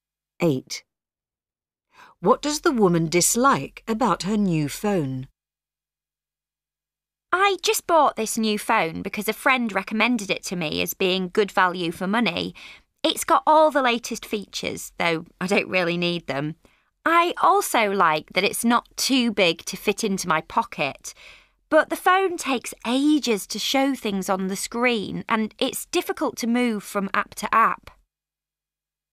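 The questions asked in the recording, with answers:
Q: What does the woman dislike about her new phone?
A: It is slow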